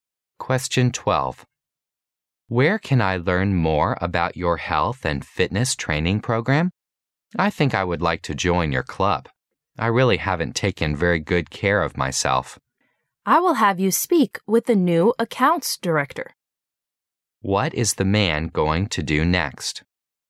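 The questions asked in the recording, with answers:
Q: What is the man going to do next?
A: Have the woman speak with the new accounts director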